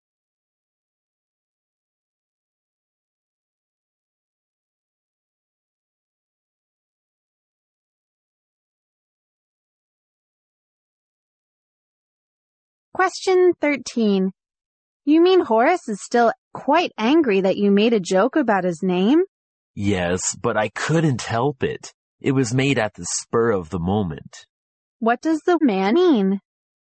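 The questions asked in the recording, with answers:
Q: What does the man mean?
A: He made the joke on impulse, without thinking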